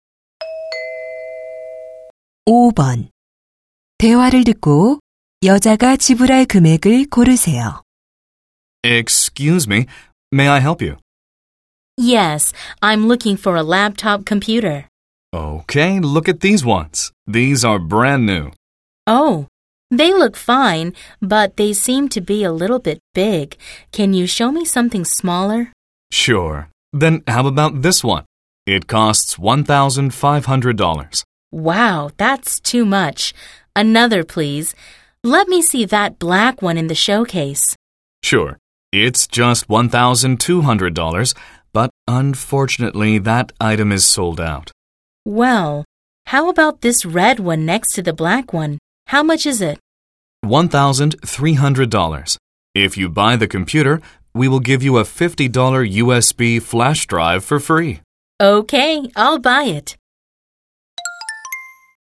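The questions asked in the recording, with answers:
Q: 대화를 듣고 여자가 지불할 금액을 고르세요.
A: $1,300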